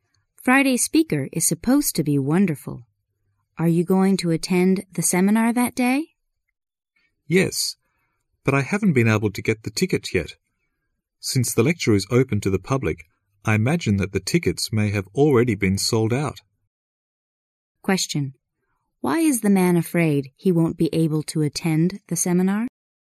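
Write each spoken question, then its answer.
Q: Why is the man afraid he won't be able to attend the seminar?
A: The tickets may already be sold out.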